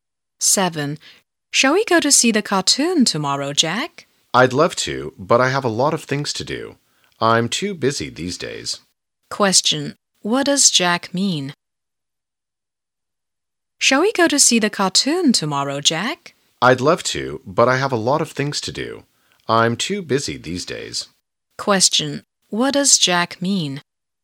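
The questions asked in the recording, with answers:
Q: what does Jack mean?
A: He can't go to see the cartoon because he is too busy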